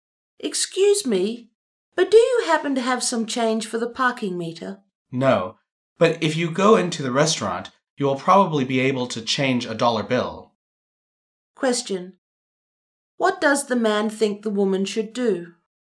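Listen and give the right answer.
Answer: Go into the restaurant to get change for a dollar bill.

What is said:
[听力原文] W: Excuse me, but do you happen to have some change for the parking meter? M: No. But if you go into the restaurant, you will probably be able to change a dollar bill. Q: What does the man think the woman should do?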